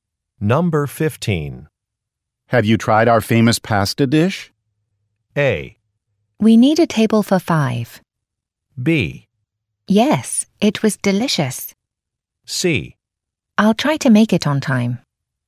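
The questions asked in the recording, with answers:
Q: Have you tried our famous pasta dish?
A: B: Yes, it was delicious.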